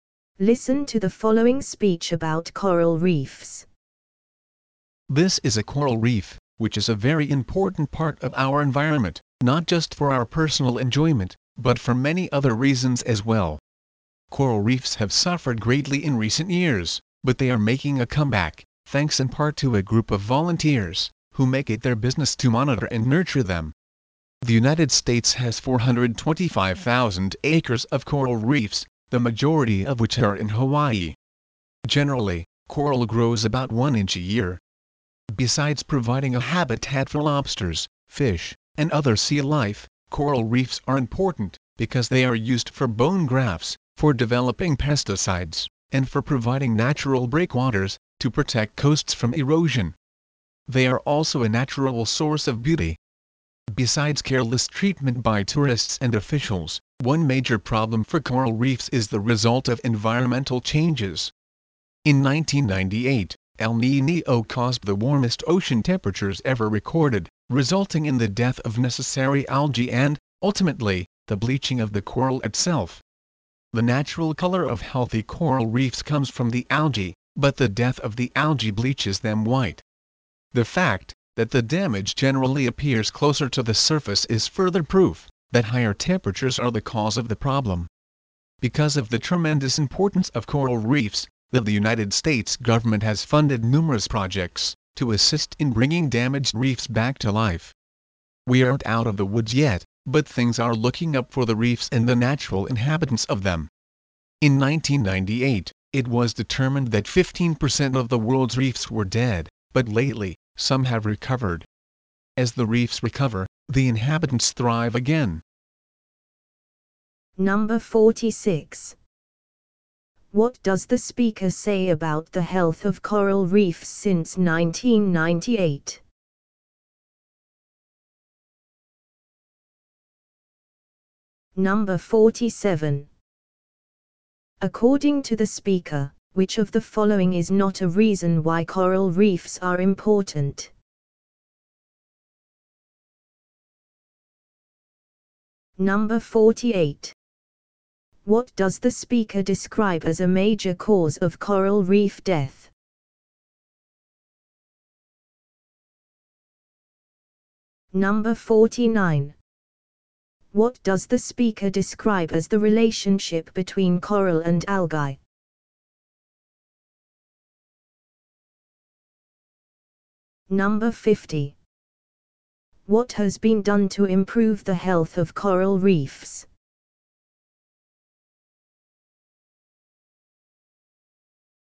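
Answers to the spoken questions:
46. Some reefs have recovered
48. Environmental changes: higher ocean temperatures
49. The algae give coral its natural color; when algae die the coral bleaches
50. The U.S. government has funded projects, and volunteers monitor and nurture them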